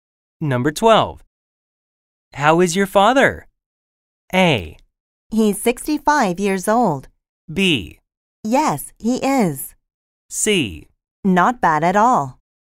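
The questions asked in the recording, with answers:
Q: How is your father?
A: C: Not bad at all.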